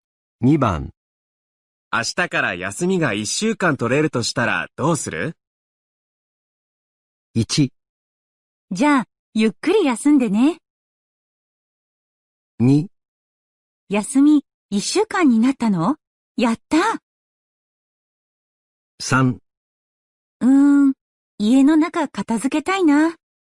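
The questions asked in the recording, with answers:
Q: 明日から休みが1週間取れるとしたらどうする?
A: 3: 家の中片付けたいな。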